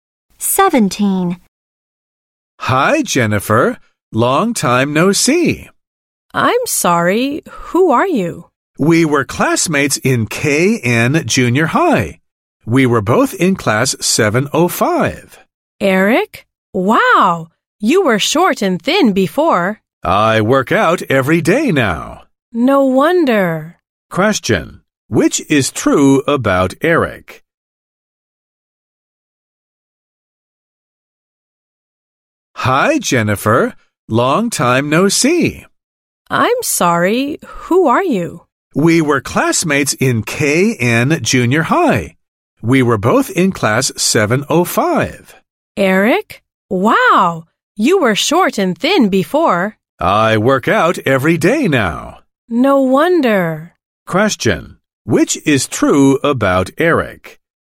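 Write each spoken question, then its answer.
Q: Which is true about Eric?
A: He was short and thin before, and now he works out every day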